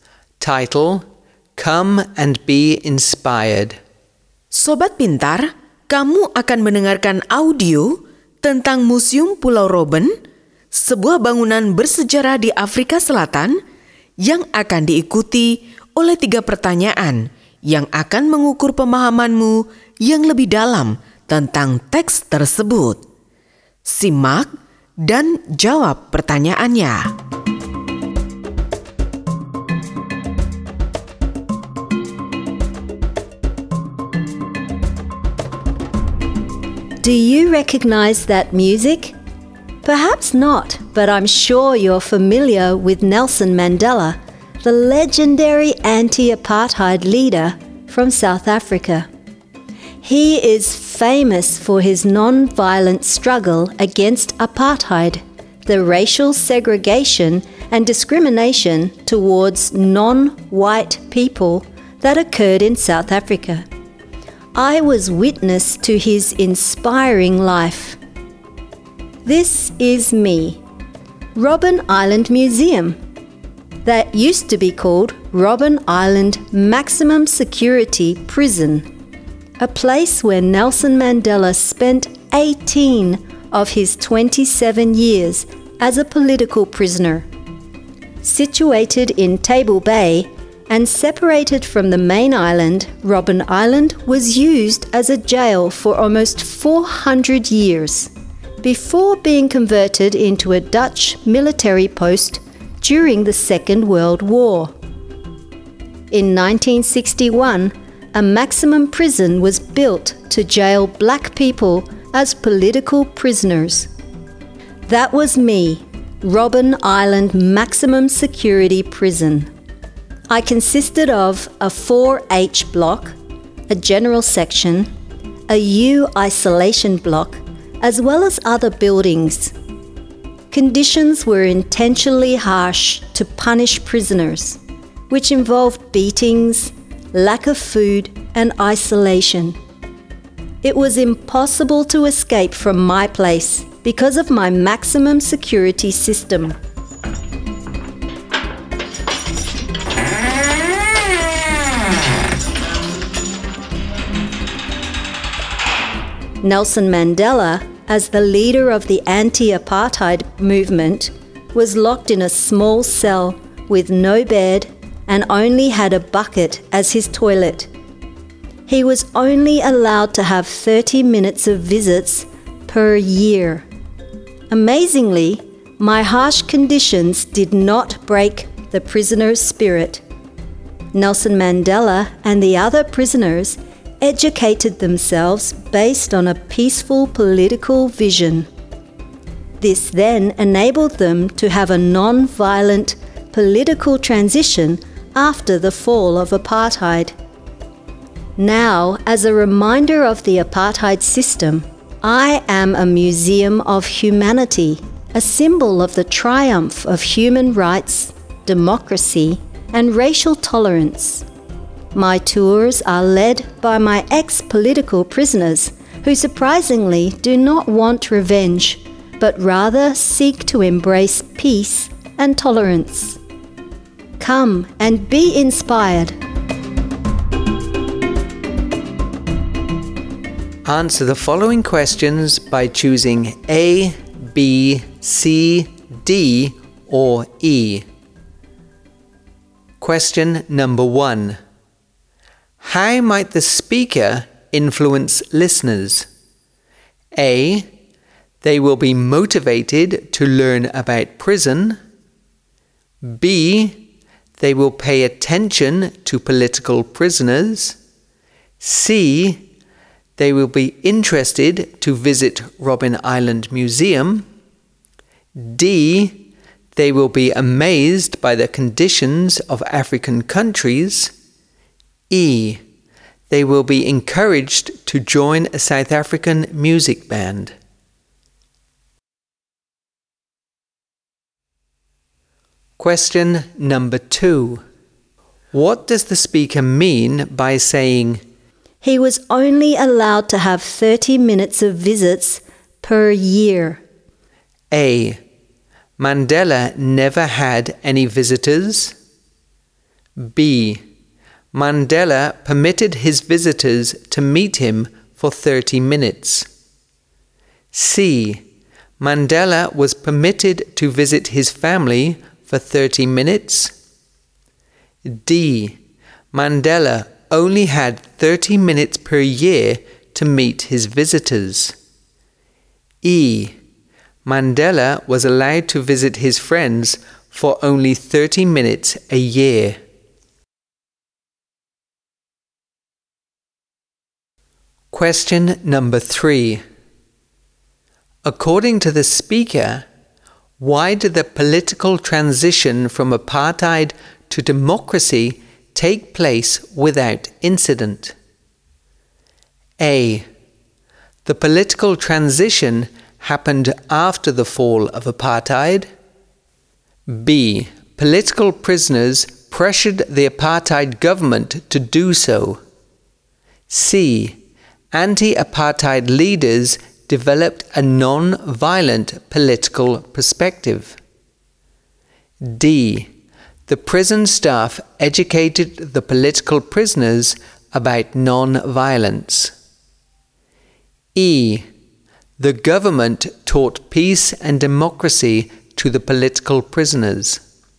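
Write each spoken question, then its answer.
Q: How might the speaker influence listeners?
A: C: They will be interested to visit Robben Island Museum.

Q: What does the speaker mean by saying, "He was only allowed to have 30 minutes of visits per year"?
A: D: Mandela only had 30 minutes per year to meet his visitors.

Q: According to the speaker, why did the political transition from apartheid to democracy take place without incident?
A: C: Anti-apartheid leaders developed a non-violent political perspective.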